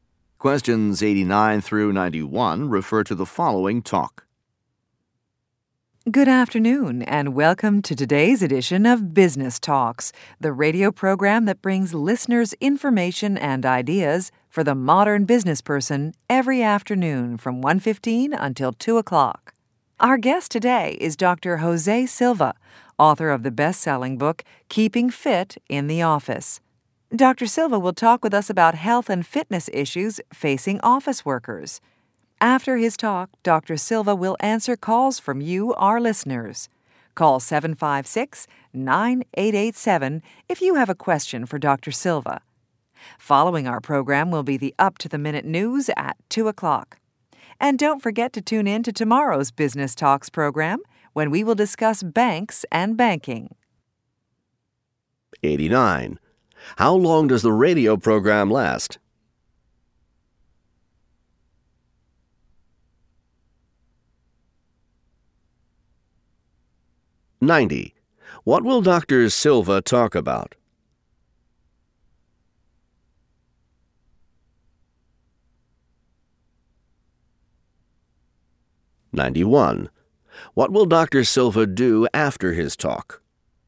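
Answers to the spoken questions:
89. 45 minutes
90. Health and fitness for office workers
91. Answer listeners' calls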